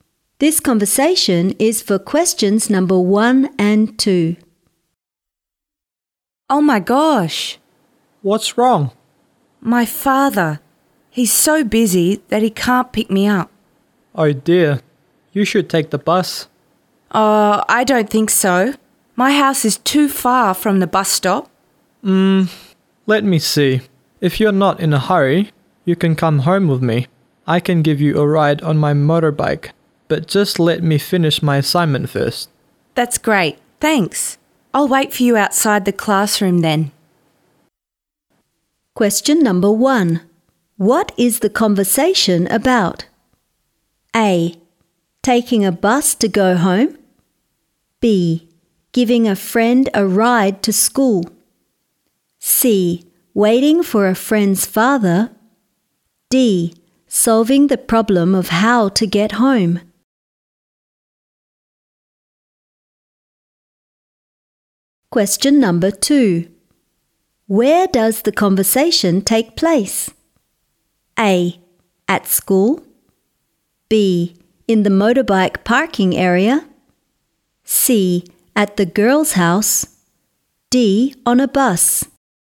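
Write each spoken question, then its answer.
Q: What is the conversation about?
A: D: Solving the problem of how to get home.

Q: Where does the conversation take place?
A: A: At school.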